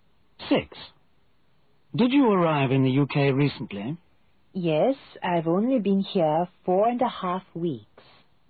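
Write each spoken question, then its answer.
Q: Did you arrive in the UK recently?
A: 4.5 weeks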